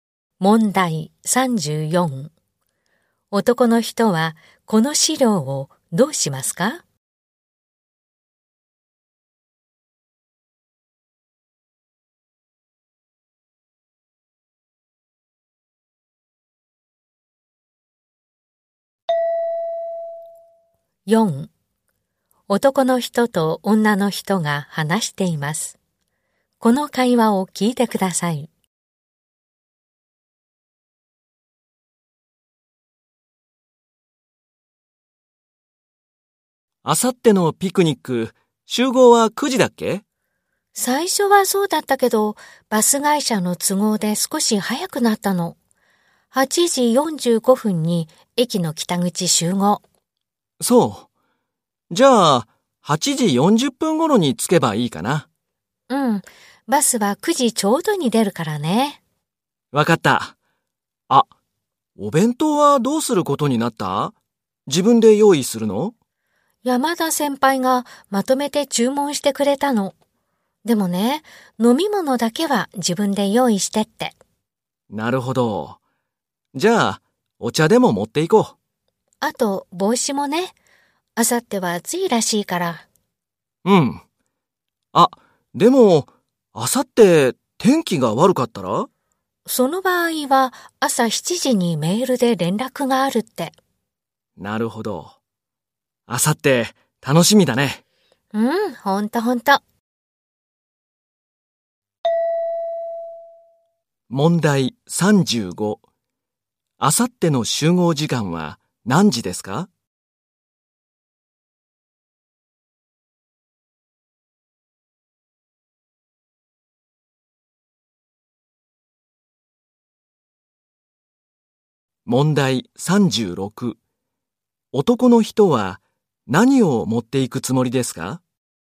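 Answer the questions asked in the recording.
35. 8時45分
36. お茶と帽子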